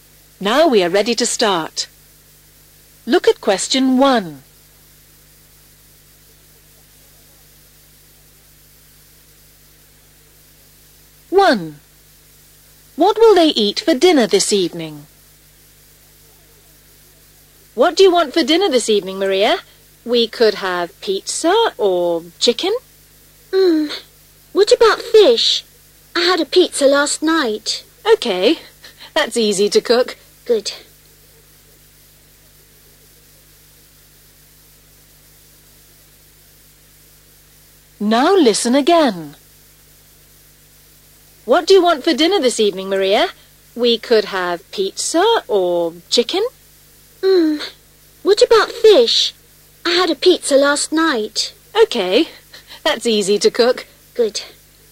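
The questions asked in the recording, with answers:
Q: What will they eat for dinner this evening?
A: fish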